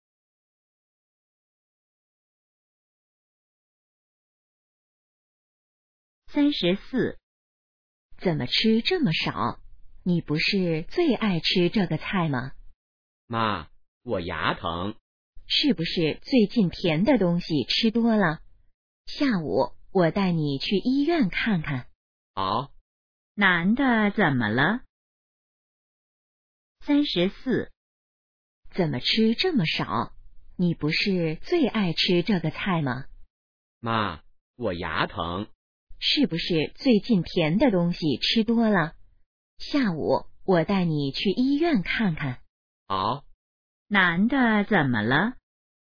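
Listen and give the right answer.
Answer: 牙疼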